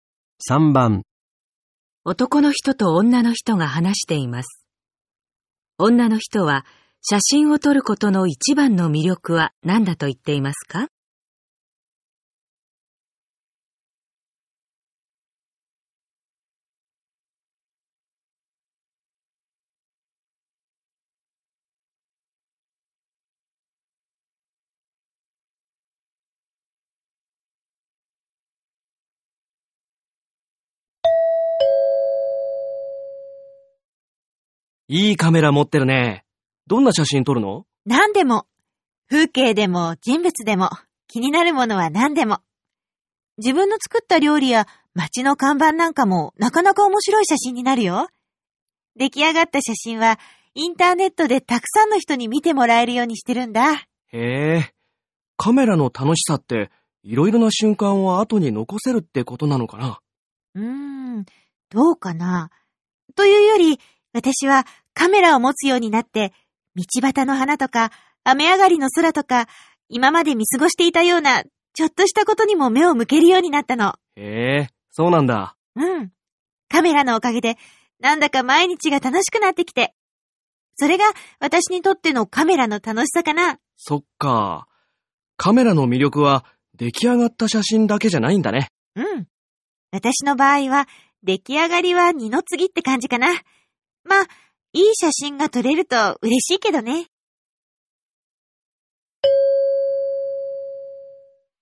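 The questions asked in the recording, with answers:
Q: 女の人は写真を撮ることの一番の魅力は何だと言っていますか?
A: 今まで見過ごしていたちょっとしたことに目を向けるようになったこと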